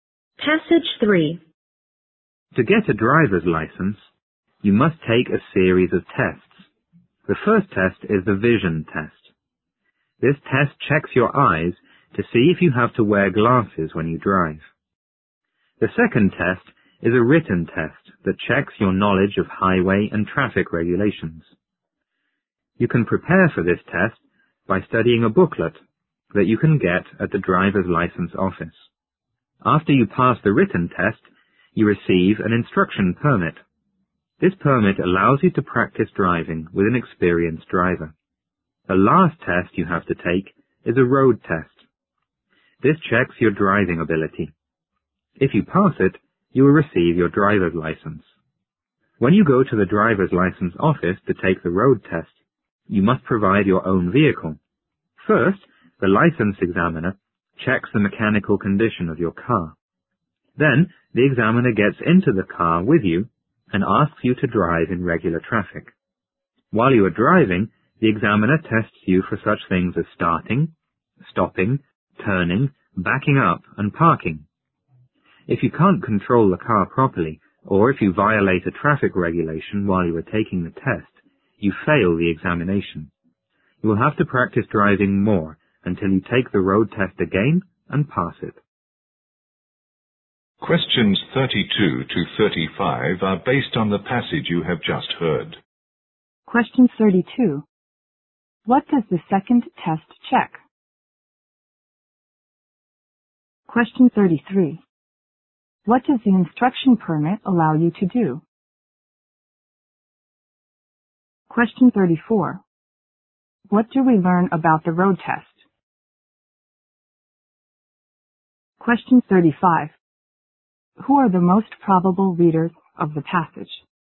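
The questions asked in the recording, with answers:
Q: What does the second test check?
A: Knowledge of highway and traffic regulations

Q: What does the instruction permit allow you to do?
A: Practice driving with an experienced driver

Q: Who are the most probable readers of the passage?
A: People who want to get a driver's license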